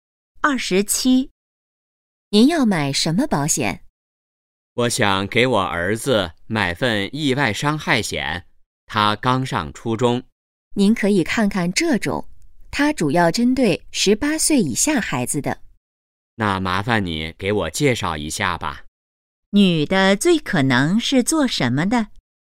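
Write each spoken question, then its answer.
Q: 女的最可能是做什么的?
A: 卖保险的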